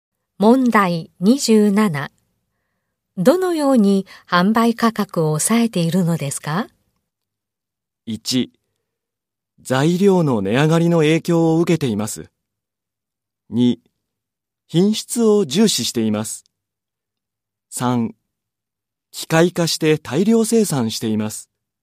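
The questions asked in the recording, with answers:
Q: どのように販売価格を抑えているのですか?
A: 3: 機械化して大量生産しています。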